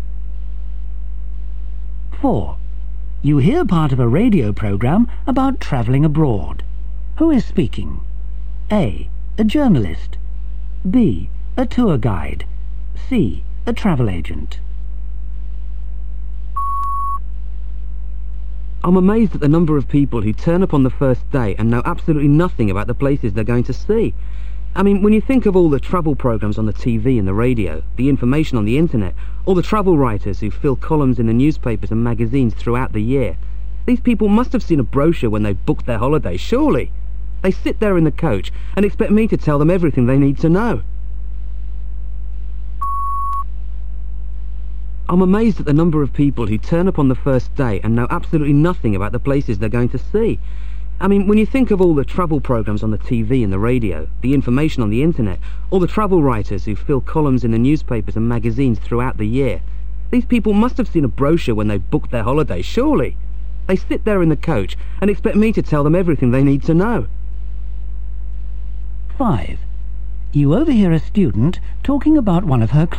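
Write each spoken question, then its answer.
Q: Who is speaking?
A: B: A tour guide.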